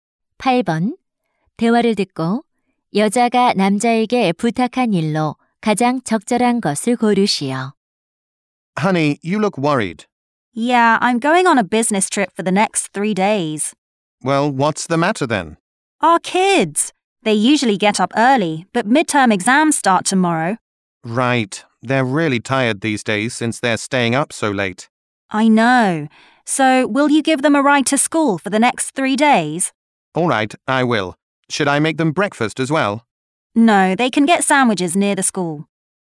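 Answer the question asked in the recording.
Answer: 3일 동안 아이들을 학교에 태워다 주기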